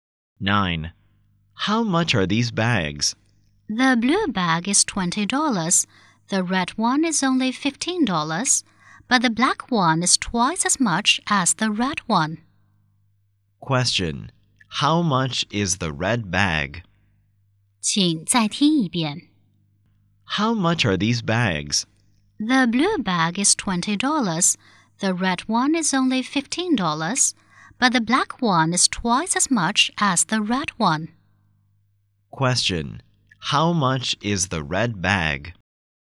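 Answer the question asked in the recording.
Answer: $15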